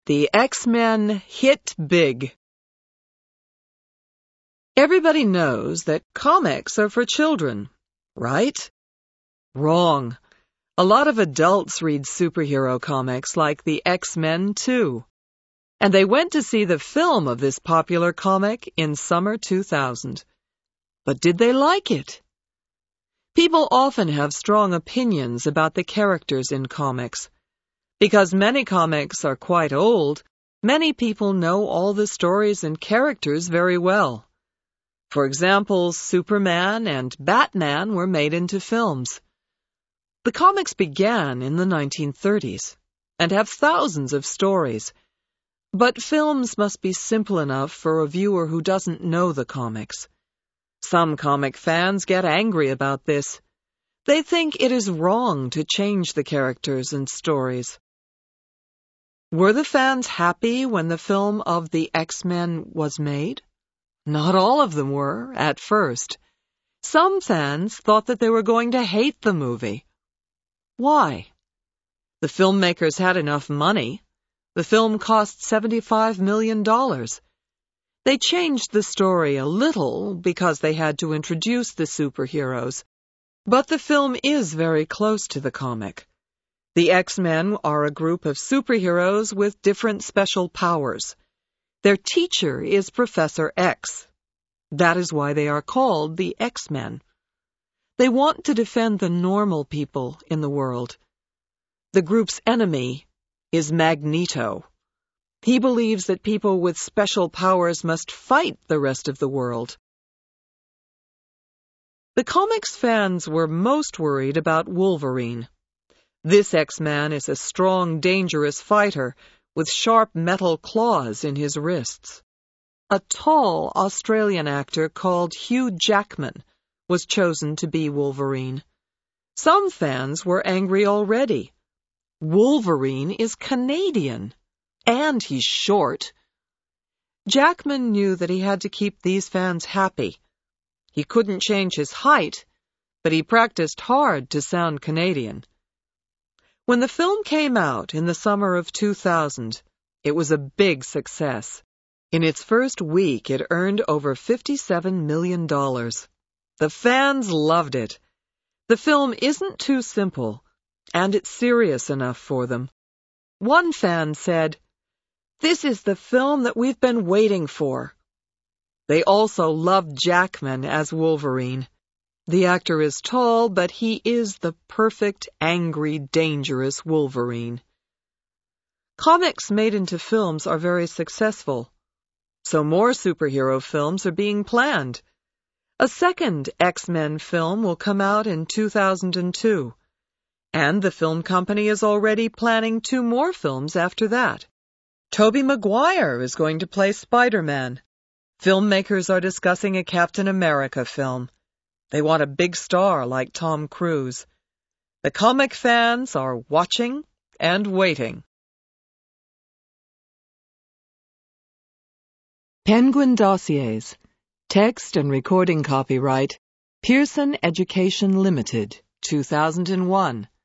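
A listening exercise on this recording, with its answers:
Complete these sentences using the word menus.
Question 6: The group is called the because of Professor X.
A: X-Men

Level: HIGH INTERMEDIATE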